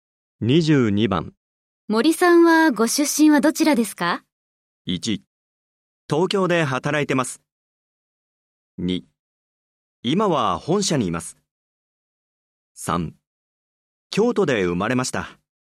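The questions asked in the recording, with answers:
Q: 森さんはご出身はどちらですか?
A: 3: 京都で生まれました。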